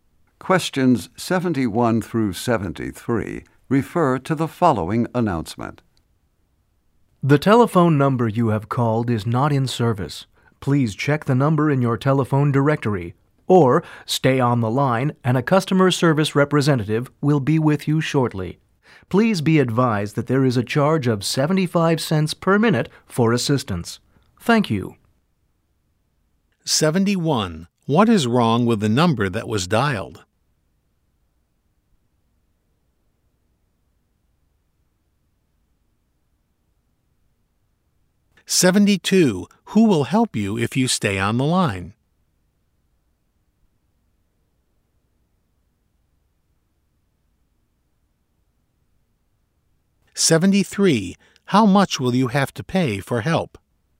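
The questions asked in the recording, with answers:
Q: What is wrong with the number that was dialed?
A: It is not in service

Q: Who will help you if you stay on the line?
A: A customer service representative

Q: How much will you have to pay for help?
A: 75 cents per minute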